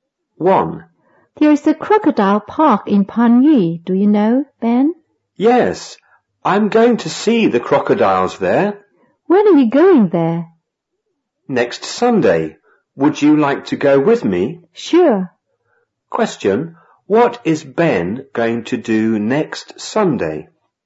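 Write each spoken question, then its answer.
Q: Question, what is Ben going to do next Sunday?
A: He is going to see the crocodiles in the crocodile park.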